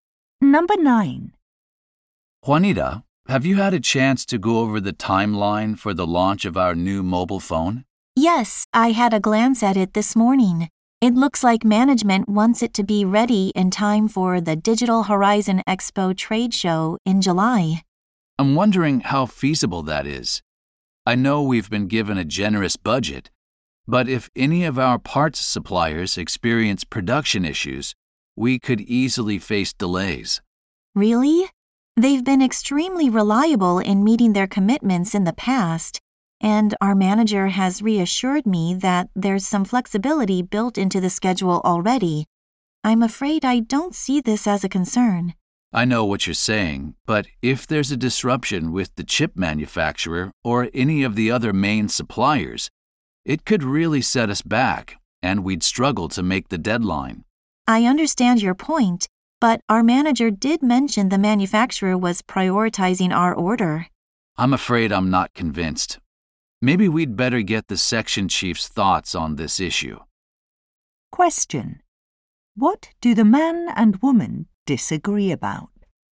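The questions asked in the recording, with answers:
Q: What do the man and woman disagree about?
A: Whether supplier problems could delay the phone launch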